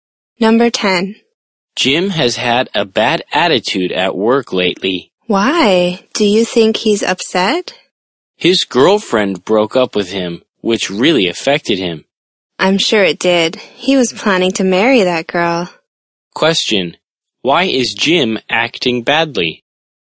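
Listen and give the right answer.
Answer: His girlfriend broke up with him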